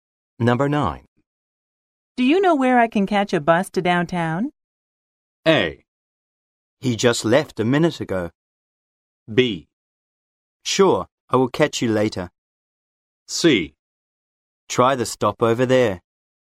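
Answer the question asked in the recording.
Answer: C: Try the stop over there.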